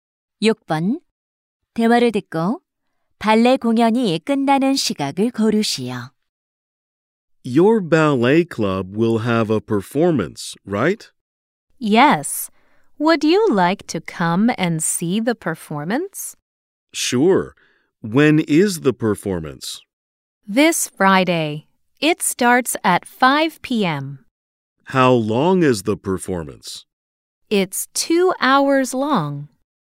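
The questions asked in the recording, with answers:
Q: 대화를 듣고 발레 공연이 끝나는 시각을 고르시오.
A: 오후 7시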